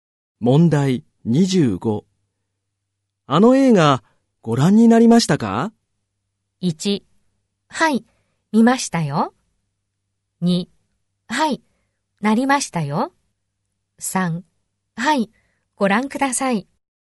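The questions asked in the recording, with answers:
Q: あの映画ご覧になりましたか?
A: 1: はい、見ましたよ。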